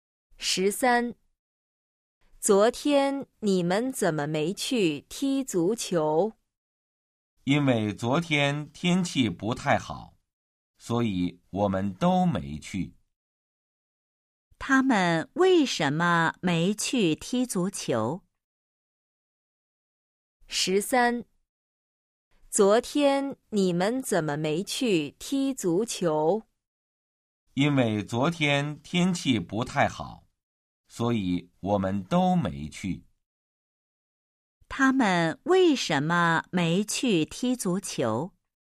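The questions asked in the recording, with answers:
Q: 他们为什么没去踢足球?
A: 因为昨天天气不太好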